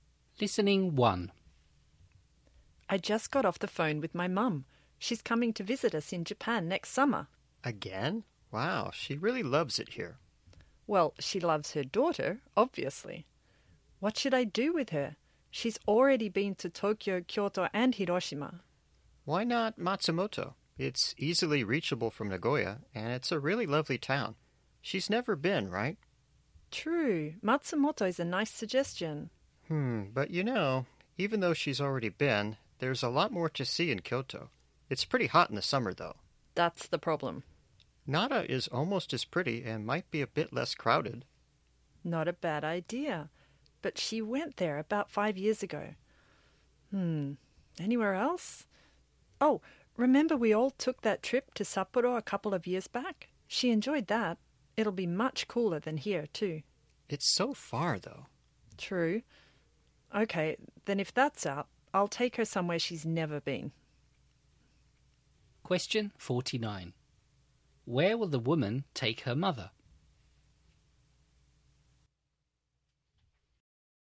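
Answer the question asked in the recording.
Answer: Matsumoto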